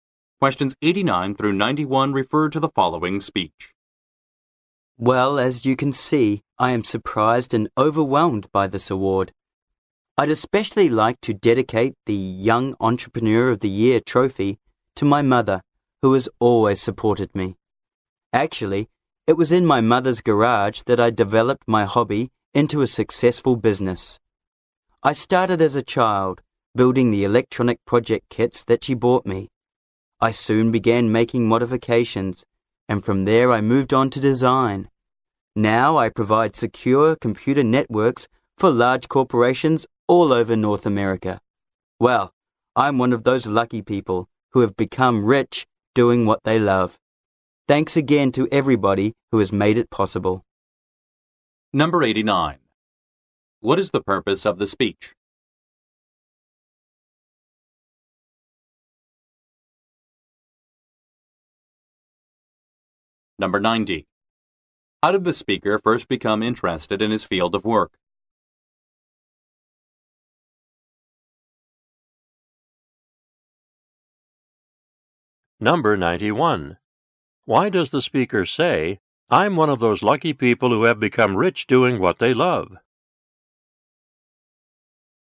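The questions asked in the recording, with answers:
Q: What is the purpose of the speech?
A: To accept an award

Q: How did the speaker first become interested in his field of work?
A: By building electronic project kits his mother bought him as a child

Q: Why does the speaker say, "I'm one of those lucky people who have become rich doing what they love"?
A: To say that his hobby became a successful business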